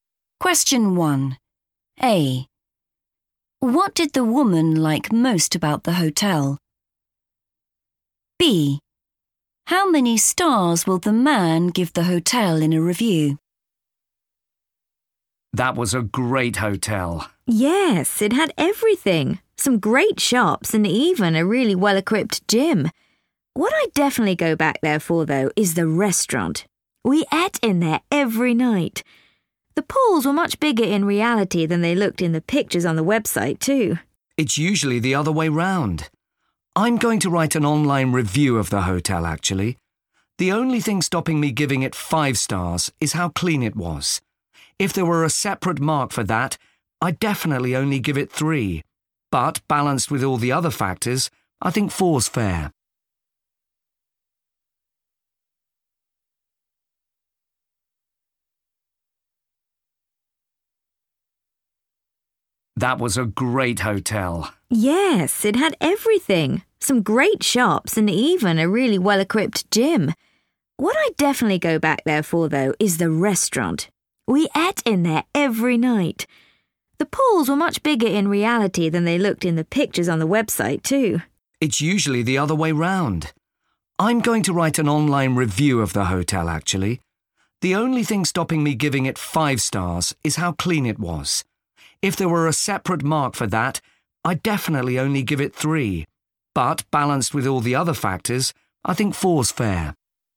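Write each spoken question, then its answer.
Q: What did the woman like most about the hotel?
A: the restaurant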